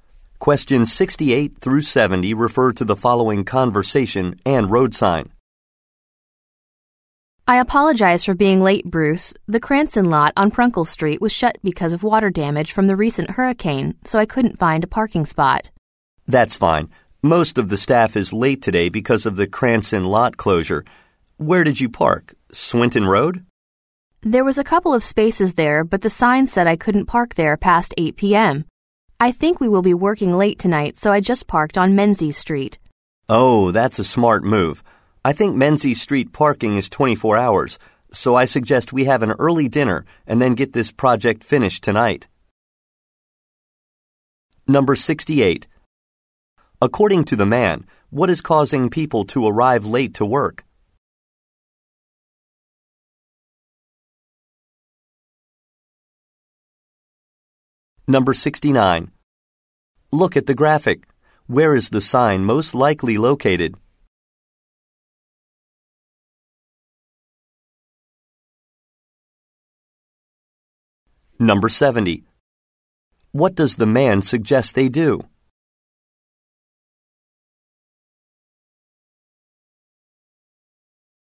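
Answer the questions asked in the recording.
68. The closure of the Cranston parking lot
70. Have an early dinner and finish the project tonight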